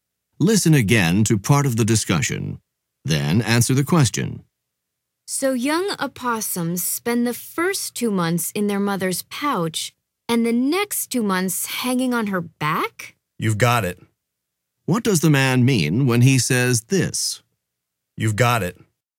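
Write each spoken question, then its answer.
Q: What does the man mean when he says this?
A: He confirms that the woman's summary is correct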